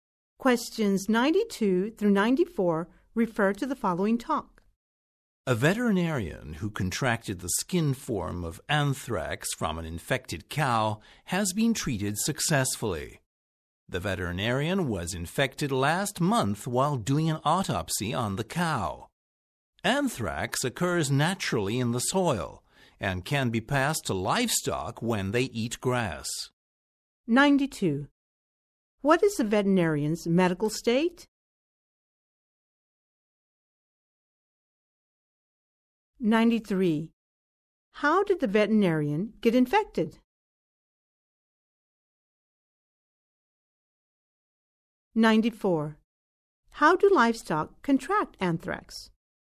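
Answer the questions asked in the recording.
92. Successfully treated
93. While doing an autopsy on an infected cow
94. By eating grass (from the soil)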